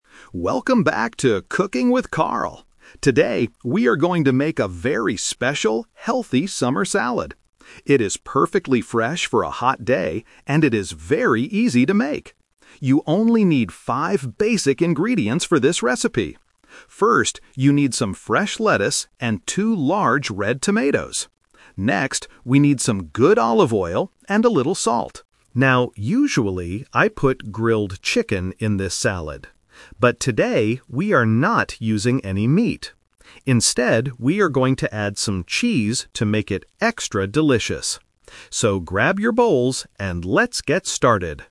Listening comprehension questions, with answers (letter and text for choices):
Listen to the TV chef introducing his cooking show, and choose the correct answer (A, B, or C) for each question.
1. What kind of food is the chef making today?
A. A hot soup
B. A summer salad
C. A chicken dish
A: B. A summer salad

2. How many ingredients are needed for this recipe?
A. Two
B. Five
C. Ten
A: B. Five

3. What is the chef going to use instead of chicken?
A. Tomatoes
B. Fish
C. Cheese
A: C. Cheese

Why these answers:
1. The chef clearly says, "Today, we are going to make a very special, healthy summer salad." Option (C) is a trap; he mentions chicken, but explicitly states, "we are not using any meat." Option (A) is a plausible TV show food but is never mentioned.
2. The chef tells the audience, "You only need five basic ingredients for this recipe." Option (A) is a trap; the number two is mentioned ("two large red tomatoes"), but it is the quantity of tomatoes, not the total number of ingredients. Option (C) is not mentioned.
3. The chef explains his twist on the recipe by saying, "Instead, we are going to add some cheese." Option (A) is a trap; tomatoes are mentioned as a basic ingredient earlier, not as the replacement for chicken. Option (B) is a plausible meat substitute, but it is not mentioned in the audio.

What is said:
Chef Carl: Welcome back to "Cooking with Carl"! Today, we are going to make a very special, healthy summer salad. It is perfectly fresh for a hot day, and it is very easy to make. You only need five basic ingredients for this recipe. First, you need some fresh lettuce and two large red tomatoes. Next, we need some good olive oil and a little salt. Now, usually, I put grilled chicken in this salad. But today, we are not using any meat. Instead, we are going to add some cheese to make it extra delicious. So, grab your bowls, and let's get started!

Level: A2